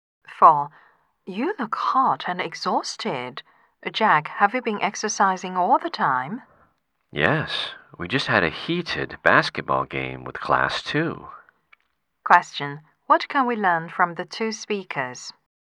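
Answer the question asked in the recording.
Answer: Jack has just played a basketball game.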